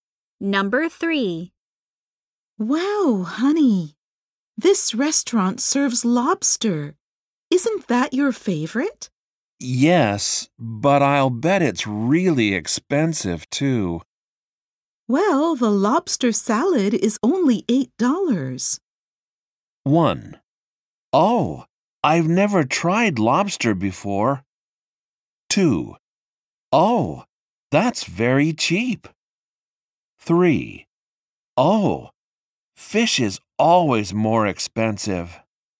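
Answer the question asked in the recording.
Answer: 2: Oh, that's very cheap.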